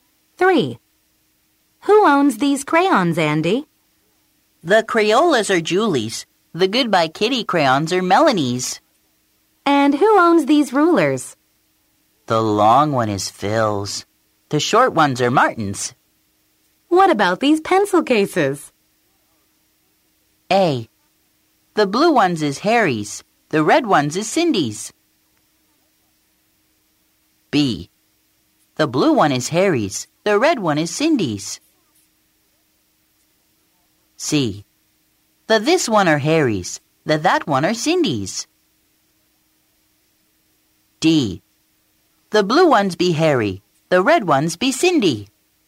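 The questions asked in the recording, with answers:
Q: What about these pencil cases?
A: B: The blue one is Harry's. The red one is Cindy's.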